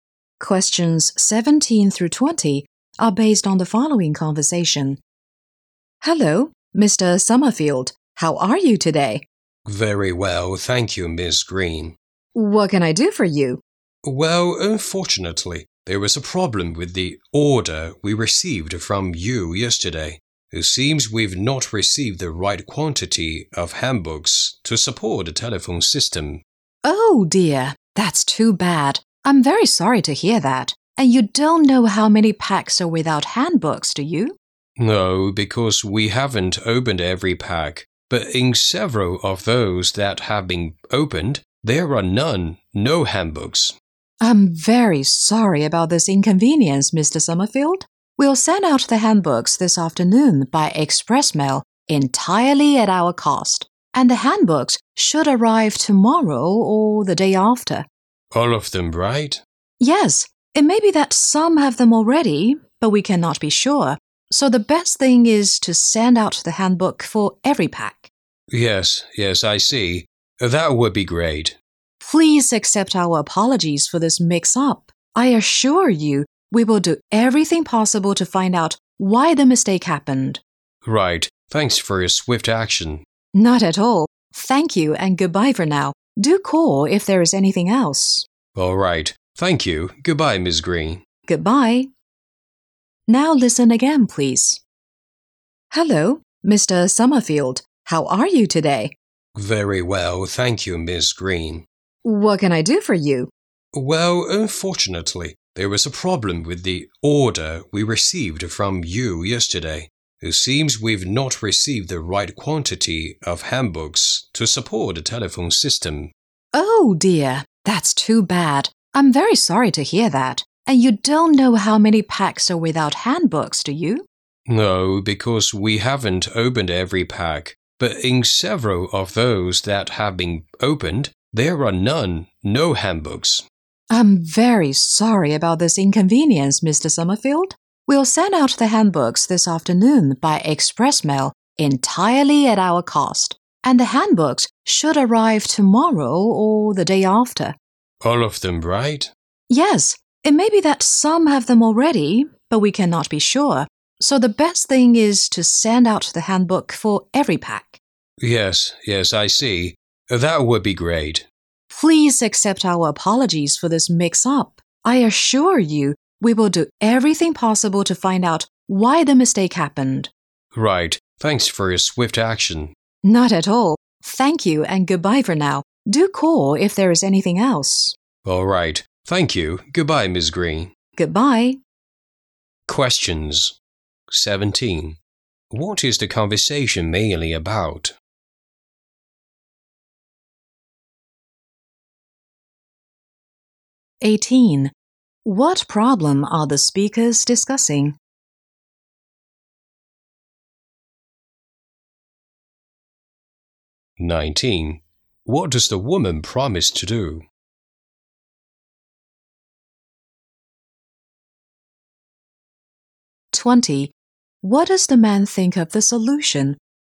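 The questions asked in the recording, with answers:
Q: What is the conversation mainly about?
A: A problem with an order

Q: What problem are the speakers discussing?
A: Handbooks missing from the telephone system packs

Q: What does the woman promise to do?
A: Send handbooks for every pack by express mail at her company's cost

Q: What does the man think of the solution?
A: He thinks it is great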